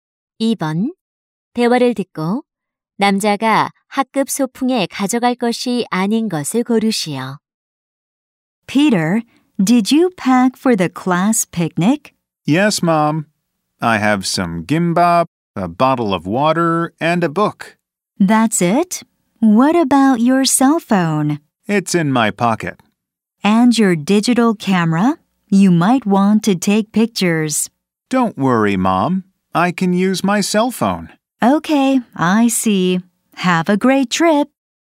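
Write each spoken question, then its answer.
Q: 대화를 듣고 남자가 학급 소풍에 가져갈 것이 아닌 것을 고르시오.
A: 디지털 카메라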